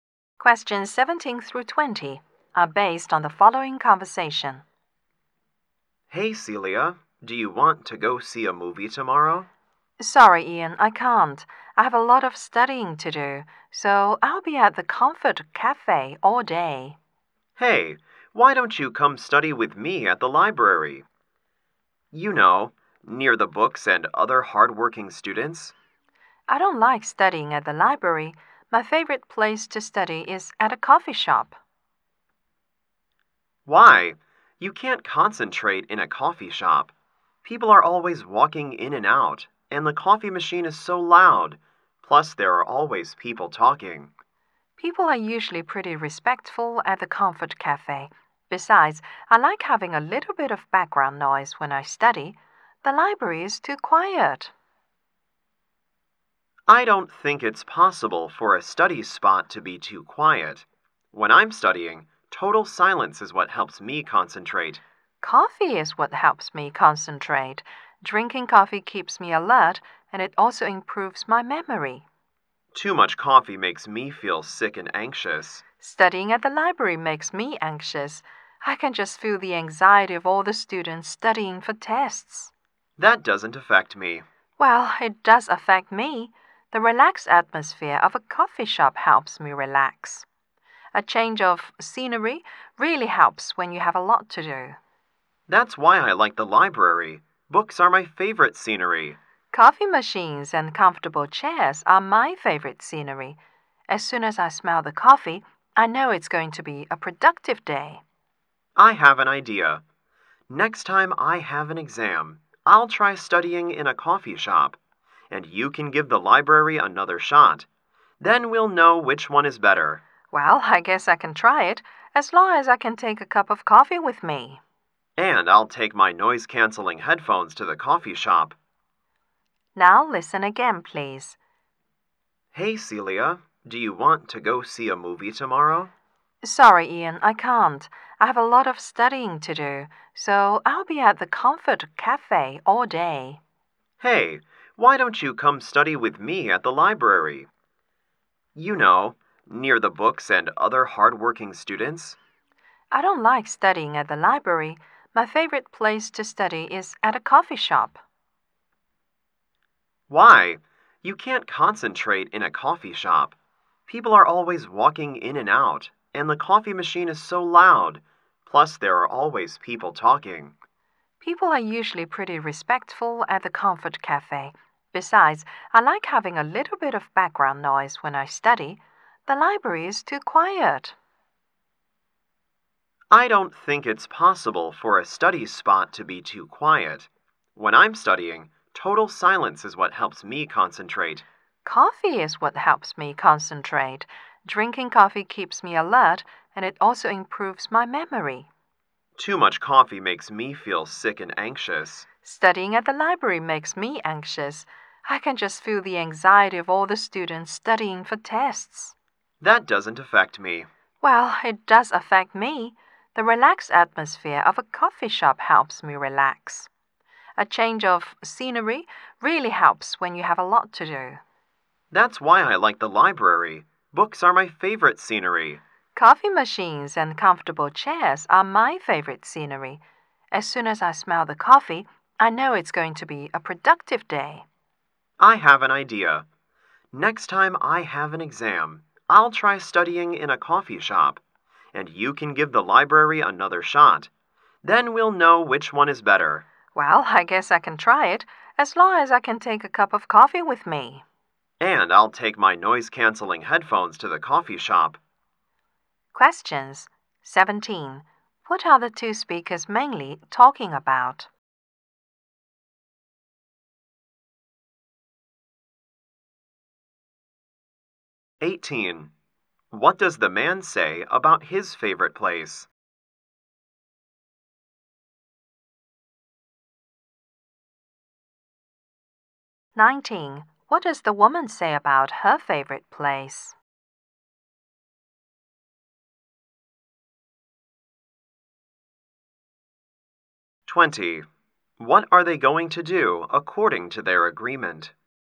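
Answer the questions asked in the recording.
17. Their favorite places to study
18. The quiet library helps him concentrate
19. The coffee shop's relaxed atmosphere and background noise help her study
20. Try studying in each other's favorite place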